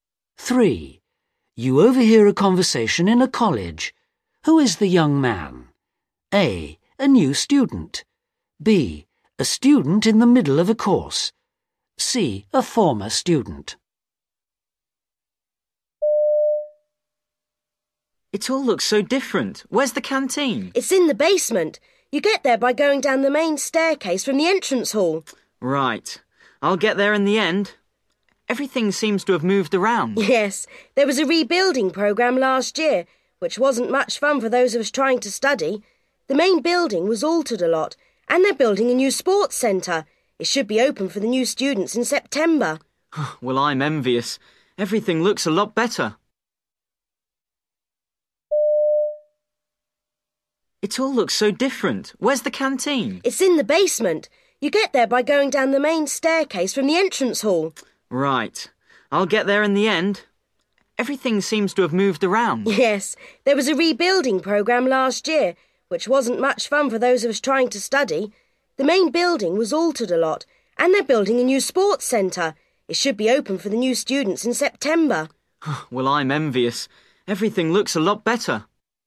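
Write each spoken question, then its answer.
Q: Who is the young man?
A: C: A former student.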